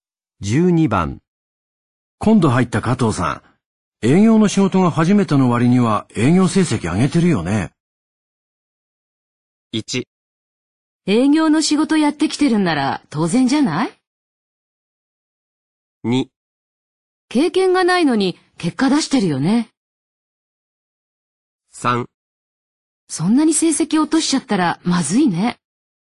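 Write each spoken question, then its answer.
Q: 今度入った加藤さん、営業の仕事が初めての割には営業成績上げてるよね。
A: 2: 経験がないのに結果出してるよね。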